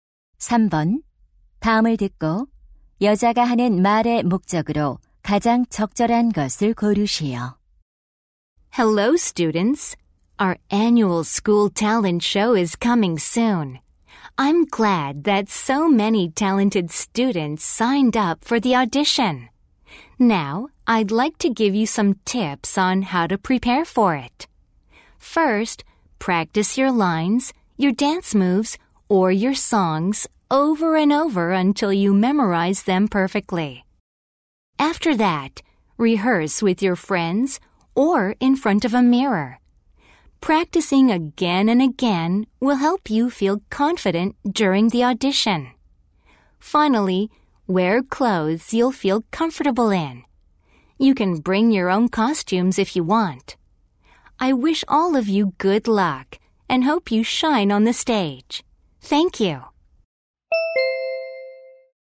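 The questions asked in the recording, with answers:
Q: 다음을 듣고 여자가 하는 말의 목적으로 가장 적절한 것을 고르시오.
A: 학예회 오디션 준비 요령을 알려 주려고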